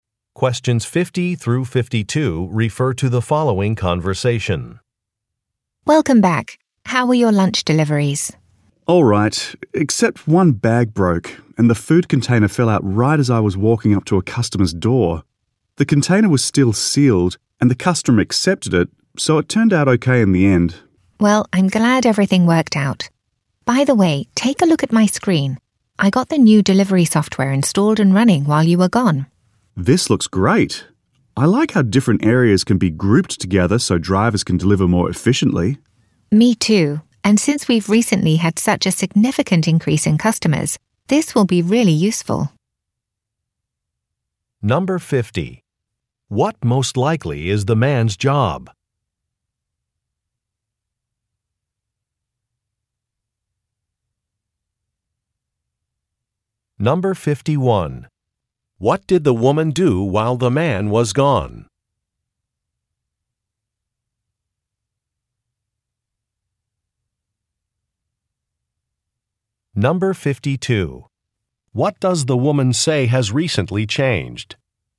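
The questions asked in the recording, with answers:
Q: What most likely is the man's job?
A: Delivery driver

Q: What did the woman do while the man was gone?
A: Installed new delivery software

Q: What does the woman say has recently changed?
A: The number of customers has increased significantly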